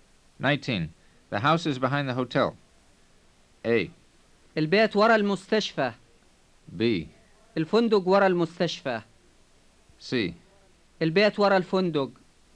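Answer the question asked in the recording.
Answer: C: البيت ورا الفندق.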